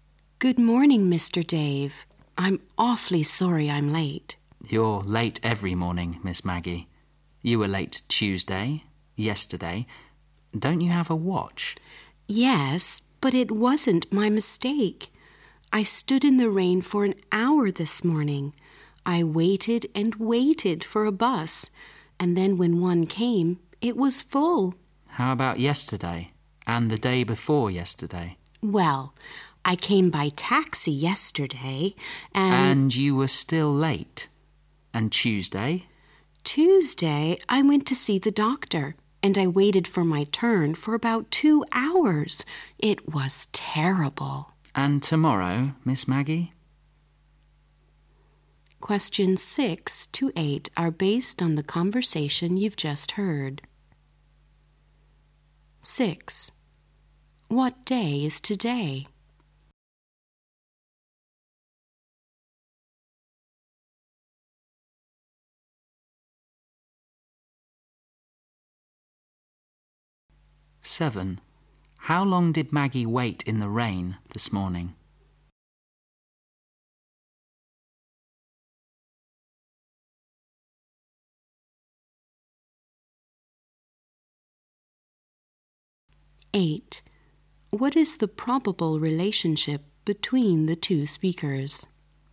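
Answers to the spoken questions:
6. Thursday
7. An hour
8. Boss and employee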